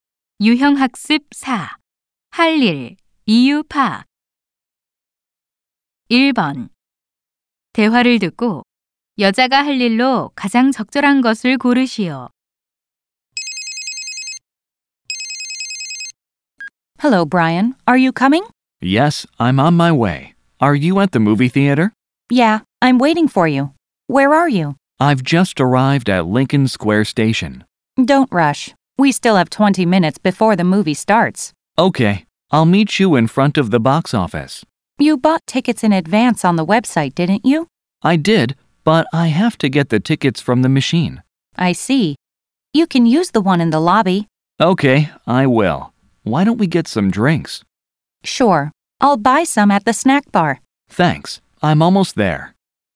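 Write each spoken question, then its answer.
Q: 대화를 듣고 여자가 할 일로 가장 적절한 것을 고르시오.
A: 스낵바에서 음료 사기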